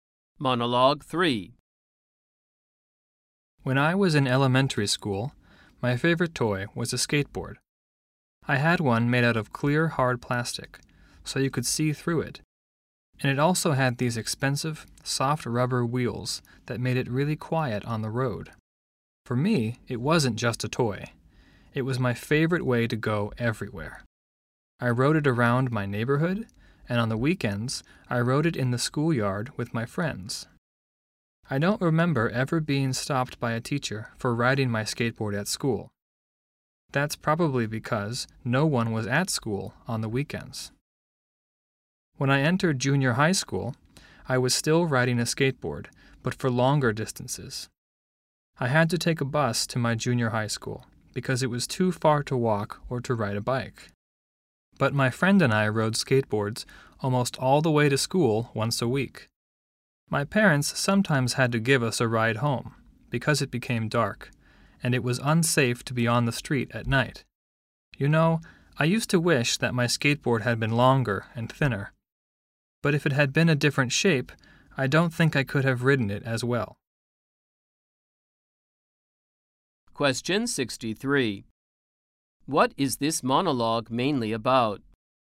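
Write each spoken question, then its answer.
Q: What is this monologue mainly about?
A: The speaker's childhood memories of riding a skateboard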